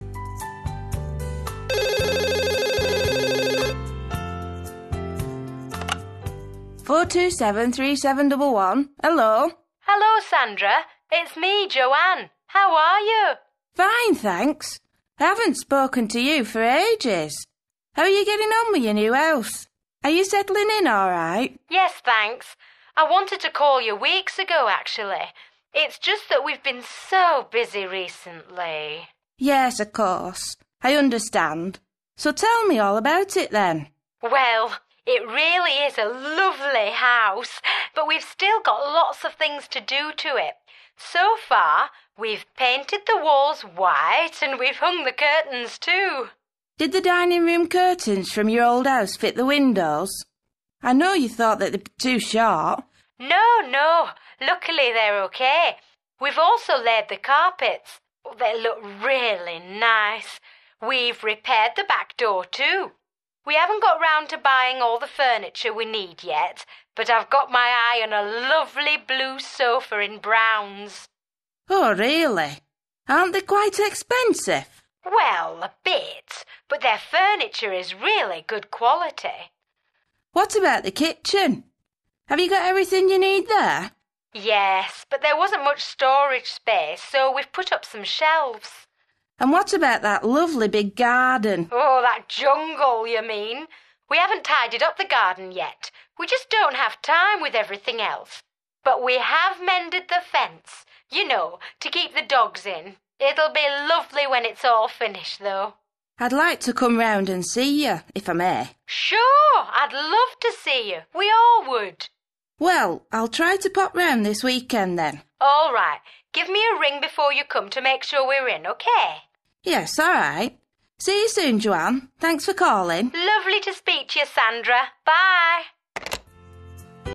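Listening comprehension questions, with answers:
2. Joanne and her husband have recently moved into a new house. Listen and tick (✓) what they've done so far.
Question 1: paint the walls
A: done

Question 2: hang the curtains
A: done

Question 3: lay the carpets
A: done

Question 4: repair the back door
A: done

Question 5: buy all the furniture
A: not done

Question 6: put up shelves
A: done

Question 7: tidy the garden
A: not done

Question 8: mend the fence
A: done

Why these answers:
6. Yes, but there wasn't much storage space, so we've put up some shelves.

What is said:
Joanne: Hello, Sandra. It's me – Joanne. How are you?
Sandra: Fine, thanks. I haven't spoken to you for ages! How are you getting on with your new house? Are you settling in all right?
Joanne: Yes, thanks. I wanted to call you weeks ago, actually – it's just that we've been so busy recently ...
Sandra: Yes, of course, I understand. 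So, tell me all about it, then!
Joanne: Well, it really is a lovely house, but we've still got lots of things to do to it. So far, we've painted the walls white, and we've hung the curtains, too.
Sandra: Did the dining-room curtains from your old house fit the windows? I know you thought that they'd be too short.
Joanne: No, no. Luckily they're OK. We've also laid the carpets. They look really nice. We've repaired the back door, too. We haven't got round to buying all the furniture we need yet, but I've got my eye on a lovely blue sofa in Brown's.
Sandra: Oh, really? Aren't they quite expensive?
Joanne: Well, a bit – but their furniture is really good quality.
Sandra: What about the kitchen? Have you got everything you need there?
Joanne: Yes, but there wasn't much storage space, so we've put up some shelves.
Sandra: And what about that lovely big garden?
Joanne: That jungle, you mean! We haven't tidied up the garden yet – we just don't have time, with everything else – but we have mended the fence. 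You know, to keep the dogs in. It'll be lovely when it's all finished, though.
Sandra: I'd like to come round and see you, if I may.
Joanne: Sure. I'd love to see you. We all would!
Sandra: Well, I'll try to pop round this weekend, then.
Joanne: All right. Give me a ring before you come, to make sure we're in, okay?
Sandra: Yes, alright. See you soon, Joanne. Thanks for calling.
Joanne: Lovely to speak to you, Sandra. Bye!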